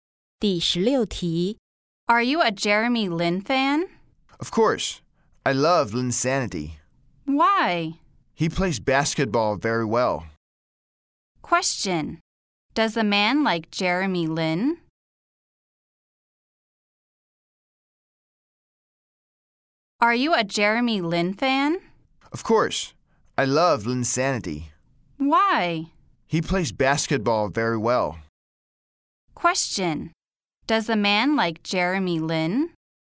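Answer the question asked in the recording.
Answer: Yes, he does.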